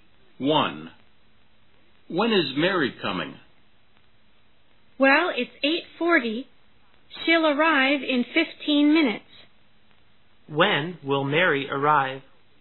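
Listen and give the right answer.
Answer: At 8:55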